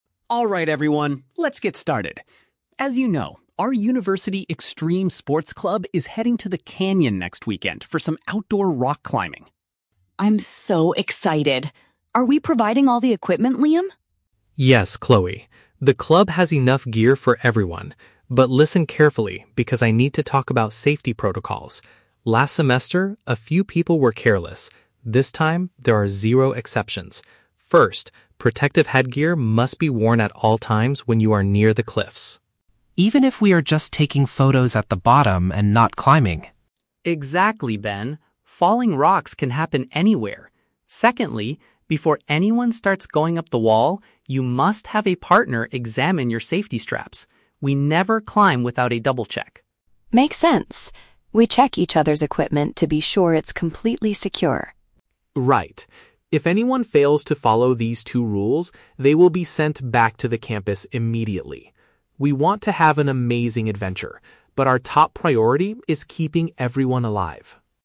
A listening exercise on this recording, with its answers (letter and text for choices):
Listen to the conversation during a university sports club meeting. Choose the correct answer (A, B, or C) for each question.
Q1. What is the main purpose of Liam's speech at the meeting?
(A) To collect money from members to buy new climbing equipment.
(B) To discuss essential security measures for an upcoming trip.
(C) To cancel the canyon adventure due to careless behavior last semester.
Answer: (B) To discuss essential security measures for an upcoming trip.

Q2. According to Liam, when are the students required to wear helmets?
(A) Only when they are actively climbing up the rock wall.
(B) During the entire bus ride from the campus to the canyon.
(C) Whenever they are close to the rocky areas, even at the bottom.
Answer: (C) Whenever they are close to the rocky areas, even at the bottom.

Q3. What must members do before they begin their climb?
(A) Have another person inspect their climbing harness.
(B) Ask a professional guide to show them the safest route.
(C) Sign a legal document promising to follow the club's rules.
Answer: (A) Have another person inspect their climbing harness.

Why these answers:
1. Liam says he needs to "talk about safety protocols" for the trip "next weekend." "Security measures" is a paraphrase for safety protocols, and "upcoming trip" matches next weekend. Why the traps are wrong: Option A is a trap; Chloe asks about equipment, but Liam says they already have enough gear (they aren't collecting money). Option C is a trap; "careless behavior last semester" is mentioned, but the current trip is NOT canceled.
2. Liam states that "protective headgear" (helmets) must be worn "when you are near the cliffs." When Ben asks if they need them while "just taking photos at the bottom," Liam says "Exactly." This matches option C. Why the traps are wrong: Option A is exactly what Ben thought, but Liam corrects him (falling rocks can happen anywhere). Option B is not mentioned.
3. Liam says, "you must have a partner examine your safety straps." Chloe adds, "We check each other's equipment." Option A perfectly paraphrases this: another person (partner) inspects (examines) their climbing harness (safety straps). Why the traps are wrong: Options B and C are very logical and common rules in real life, but they are never mentioned in the audio script.

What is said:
Liam (President): Alright everyone, let's get started. As you know, our university extreme sports club is heading to the canyon next weekend for some outdoor rock climbing.
Chloe (Member 1): I'm so excited! Are we providing all the equipment, Liam?
Liam: Yes, Chloe. The club has enough gear for everyone. But listen carefully, because I need to talk about safety protocols. Last semester, a few people were careless. This time, there are zero exceptions. First, protective headgear must be worn at all times when you are near the cliffs.
Ben (Member 2): Even if we are just taking photos at the bottom and not climbing?
Liam: Exactly, Ben. Falling rocks can happen anywhere. Secondly, before anyone starts going up the wall, you must have a partner examine your safety straps. We never climb without a double-check.
Chloe: Makes sense. We check each other's equipment to be sure it's completely secure.
Liam: Right. If anyone fails to follow these two rules, they will be sent back to the campus immediately. We want to have an amazing adventure, but our top priority is keeping everyone alive.